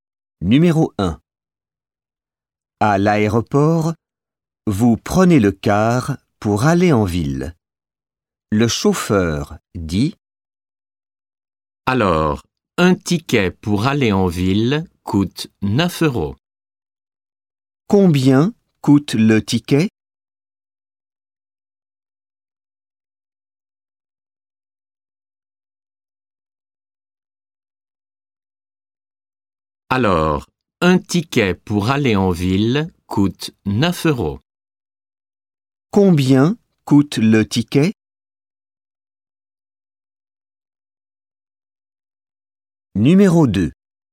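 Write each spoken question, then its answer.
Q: Combien coûte le ticket?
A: 9 euros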